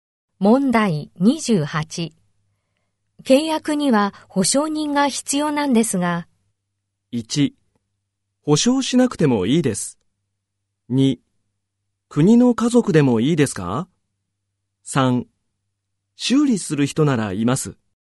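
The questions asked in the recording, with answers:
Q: 契約には保証人が必要なんですが。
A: 2: 国の家族でもいいですか?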